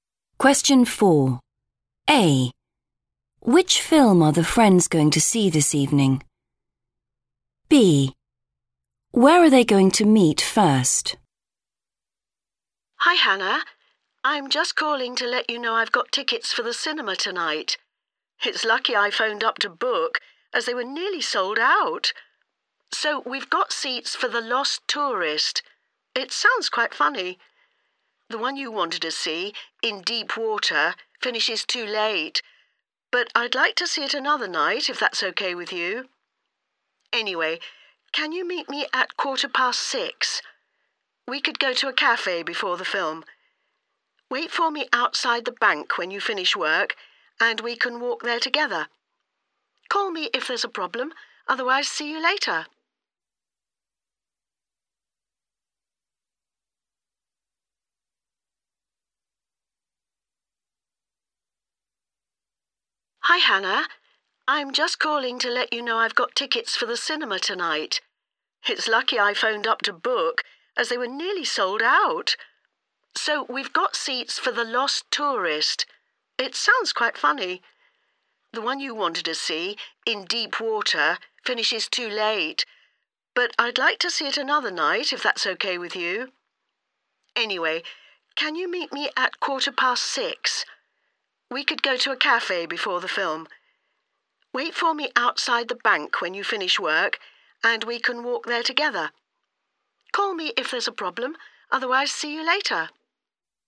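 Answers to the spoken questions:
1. The Lost Tourist
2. outside the bank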